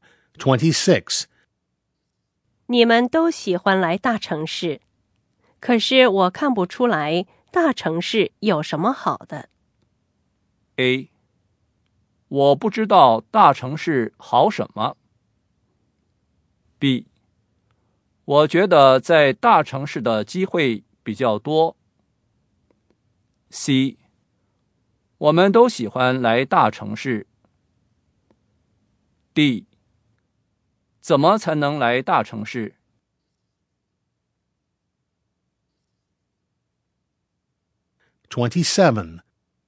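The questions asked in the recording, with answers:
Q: 你们都喜欢来大城市,可是我看不出来大城市有什么好的。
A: B: 我觉得在大城市的机会比较多。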